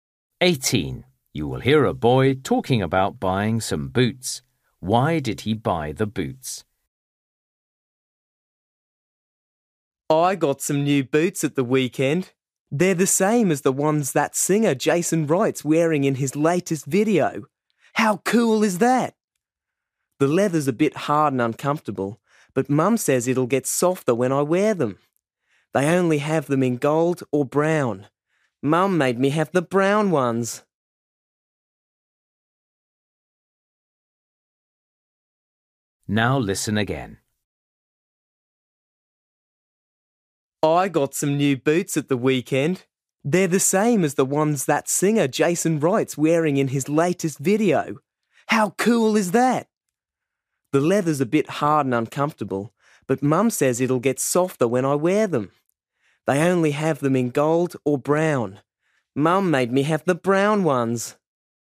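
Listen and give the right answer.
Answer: They are the same as the ones Jason Wright wears in his latest video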